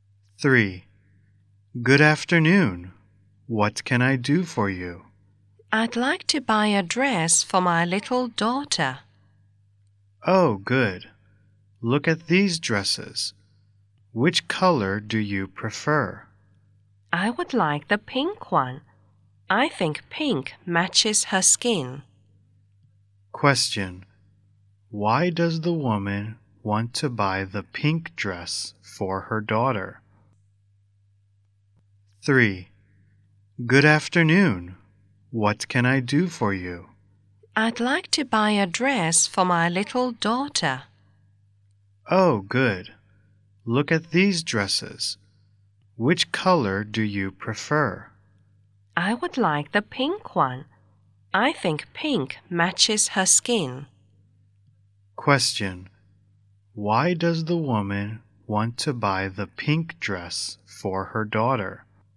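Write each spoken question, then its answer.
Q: Why does the woman want to buy the pink dress for her daughter?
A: She thinks pink matches her daughter's skin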